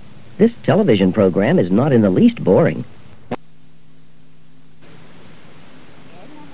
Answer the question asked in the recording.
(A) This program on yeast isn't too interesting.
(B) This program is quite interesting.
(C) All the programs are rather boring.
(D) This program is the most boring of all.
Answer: (B) This program is quite interesting.

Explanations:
This television program is not in the least boring..

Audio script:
19. She's been through a lot lately.
20. This television program is not in the least boring..